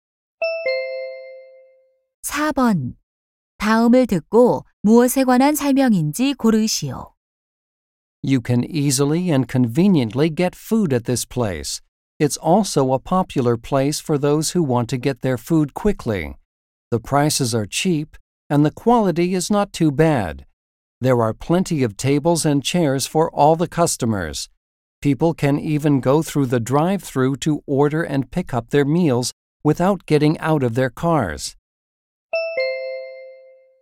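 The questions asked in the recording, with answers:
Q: 다음을 듣고 무엇에 관한 설명인지 고르시오.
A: 패스트푸드 음식점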